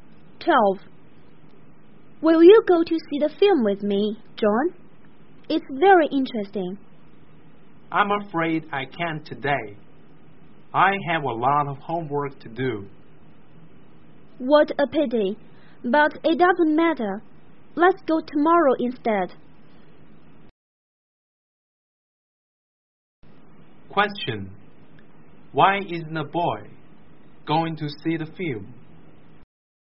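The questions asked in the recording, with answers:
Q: Why isn't a boy going to see the film?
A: He has a lot of homework to do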